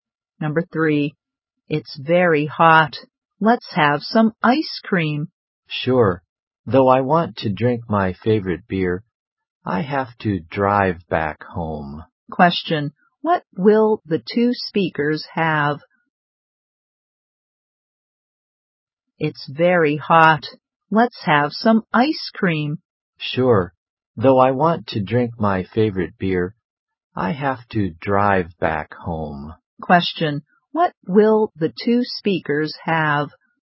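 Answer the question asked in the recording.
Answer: Ice cream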